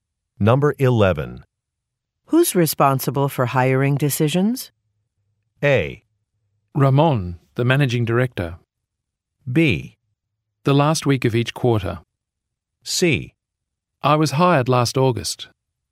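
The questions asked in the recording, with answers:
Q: Who's responsible for hiring decisions?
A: A: Ramon, the managing director.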